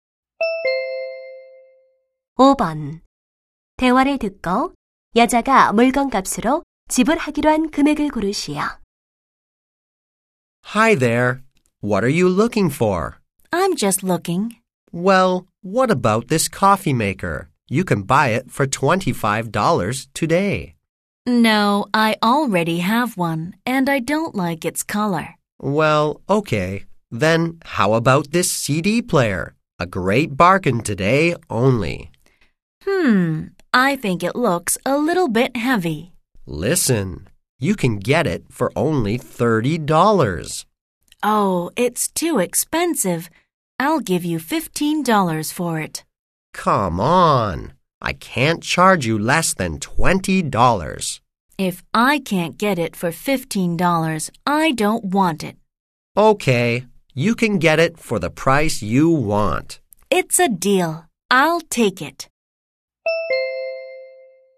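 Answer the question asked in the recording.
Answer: 15달러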